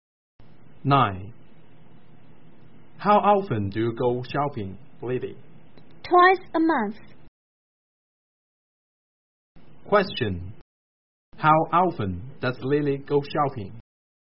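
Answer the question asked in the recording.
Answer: Twice a month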